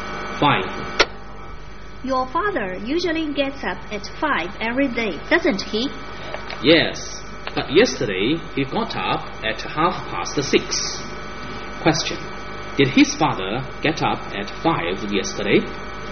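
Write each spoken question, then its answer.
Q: Did his father get up at 5 yesterday?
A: No, he got up at 6:30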